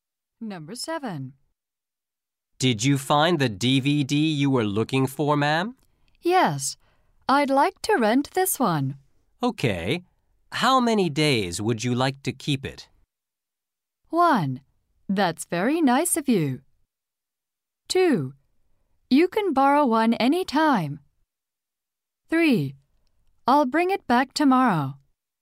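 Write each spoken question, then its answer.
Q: Okay, how many days would you like to keep it?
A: 3: I'll bring it back tomorrow.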